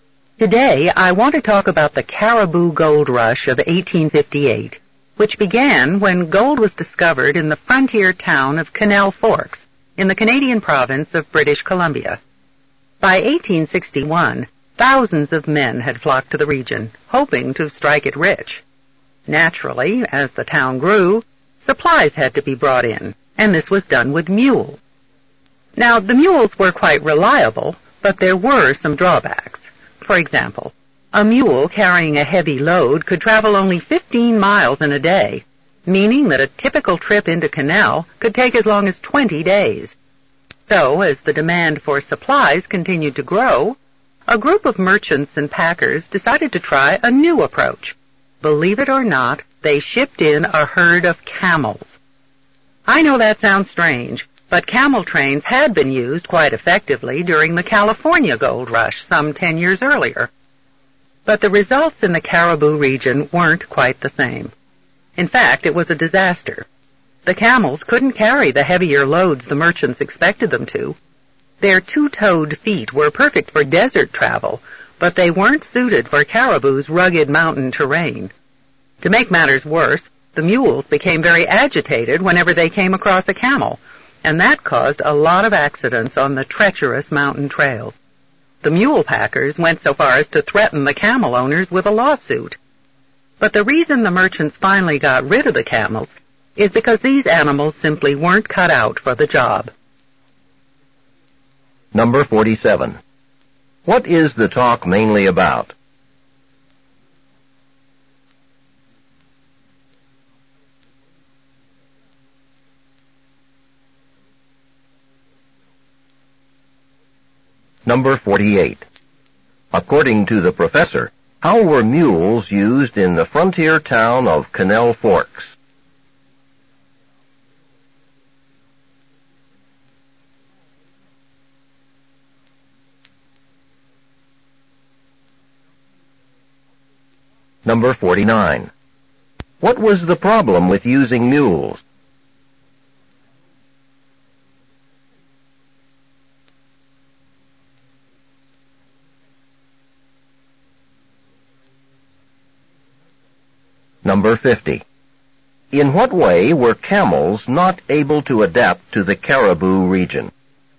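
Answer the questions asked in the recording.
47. The failed use of camels to carry supplies during the Cariboo Gold Rush
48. To bring in supplies
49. They were slow; only 15 miles a day, so a trip took up to 20 days
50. Their feet weren't suited to the rugged mountain terrain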